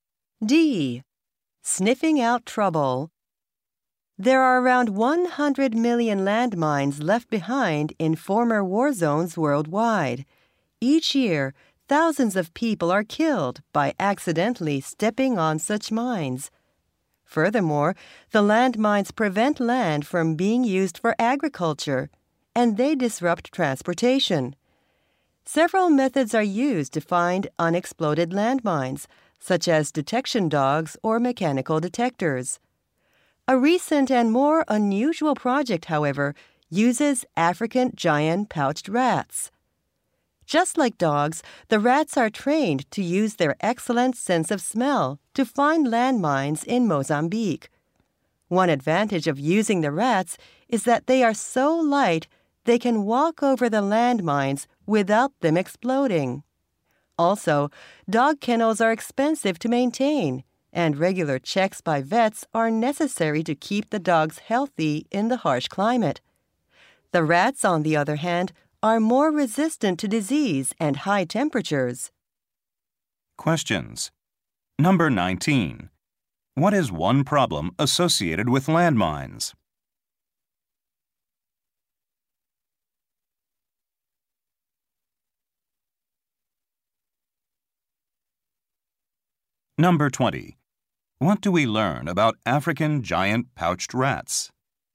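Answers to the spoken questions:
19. They keep land from being used for farming
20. They are light enough not to set off mines and resist disease and heat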